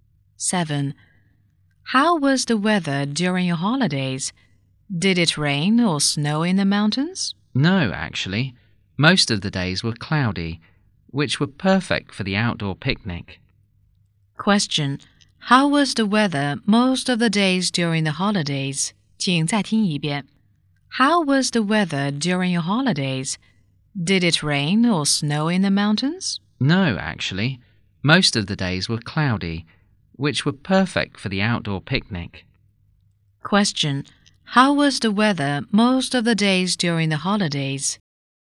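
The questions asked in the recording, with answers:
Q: How was the weather most of the days during the holidays?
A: Cloudy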